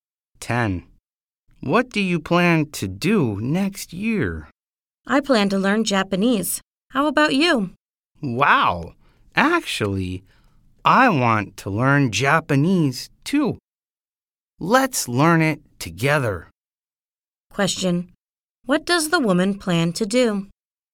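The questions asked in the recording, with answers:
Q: What does the woman plan to do?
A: Learn Japanese.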